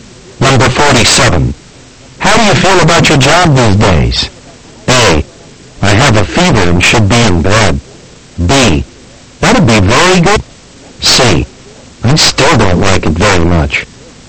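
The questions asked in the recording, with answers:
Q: How do you feel about your job these days?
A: C: I still don't like it very much.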